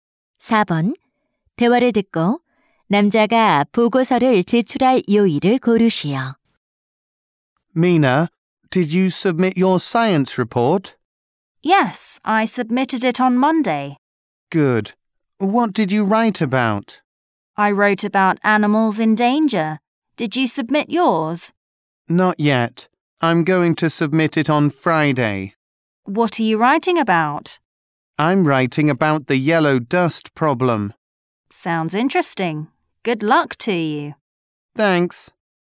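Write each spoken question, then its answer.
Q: 대화를 듣고 남자가 보고서를 제출할 요일을 고르시오.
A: 금요일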